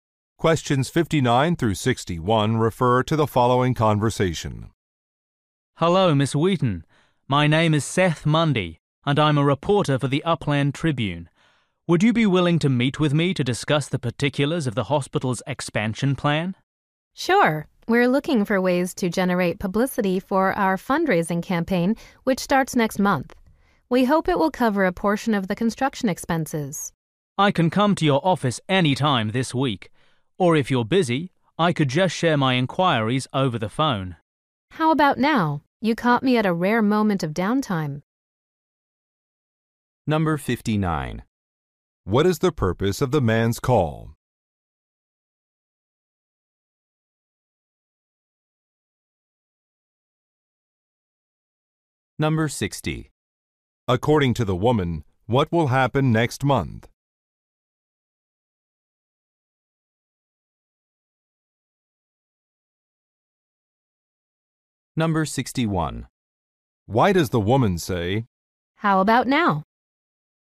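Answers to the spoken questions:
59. To request an interview about the hospital's expansion
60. A fundraising campaign will start
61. She is available to talk right now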